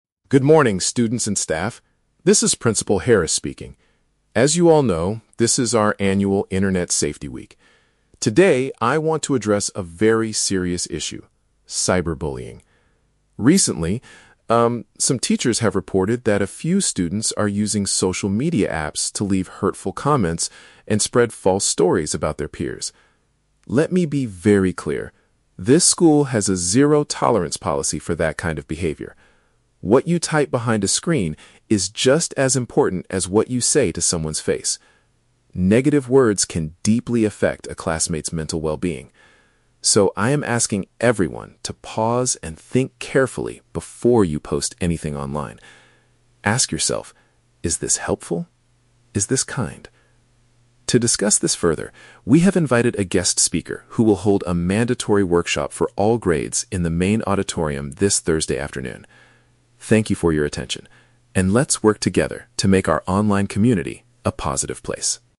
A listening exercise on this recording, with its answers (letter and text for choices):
Listen to a school principal making an announcement. For each question, choose the correct answer (A, B, or C).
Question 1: What is the main reason the principal is making this announcement?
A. To introduce a new rule that bans smartphones in the classroom.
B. To address the problem of students posting unkind things on the internet.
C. To warn teachers about spending too much time on their social media accounts.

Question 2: According to the principal, what should students do before sharing a comment online?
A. Take a moment to consider if their words are polite and useful.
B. Show their message to a teacher or parent to get permission.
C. Delete their social media applications if they feel angry.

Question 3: What event is scheduled to happen later this week?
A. The principal will call the parents of the students who broke the rules.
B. Students will take a difficult exam about internet safety in the auditorium.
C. Everyone will attend a special presentation about online behavior.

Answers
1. B. To address the problem of students posting unkind things on the internet.
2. A. Take a moment to consider if their words are polite and useful.
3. C. Everyone will attend a special presentation about online behavior.

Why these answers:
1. The principal says some students are using apps to "leave hurtful comments and spread false stories," which means they are posting unkind things. Option (A) is a plausible school rule, but it is never mentioned in the audio. Option (C) is a trap; the principal mentions "teachers," but only because the teachers reported the problem, not because the teachers did something wrong.
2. The principal asks everyone to "pause and think carefully" (take a moment to consider) and ask if the comment is "helpful" (useful) and "kind" (polite). Options (B) and (C) are plausible pieces of advice for children, but they are not mentioned in this announcement.
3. The principal announces that a "guest speaker" will hold a "mandatory workshop for all grades," which means everyone must attend a special presentation. Option (A) is a trap; the principal mentions a "zero-tolerance policy," but does not explicitly say he will call parents this Thursday. Option (B) is a trap; he mentions the "main auditorium," but they are going there for a workshop, not an exam.

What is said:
Principal Harris: Good morning, students and staff. This is Principal Harris speaking. As you all know, this is our annual Internet Safety Week. Today, I want to address a very serious issue: cyberbullying. Recently, um, some teachers have reported that a few students are using social media apps to leave hurtful comments and spread false stories about their peers. Let me be very clear: this school has a zero-tolerance policy for that kind of behavior. What you type behind a screen is just as important as what you say to someone's face. Negative words can deeply affect a classmate's mental well-being. So, I am asking everyone to pause and think carefully before you post anything online. Ask yourself, "Is this helpful? Is this kind?" To discuss this further, we have invited a guest speaker who will hold a mandatory workshop for all grades in the main auditorium this Thursday afternoon. Thank you for your attention, and let's work together to make our online community a positive place.